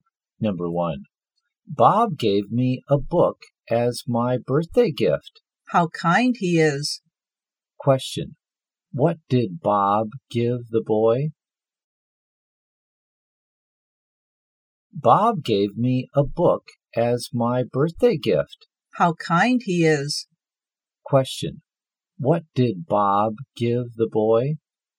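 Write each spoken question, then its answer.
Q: Question, what did Bob give the boy?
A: A book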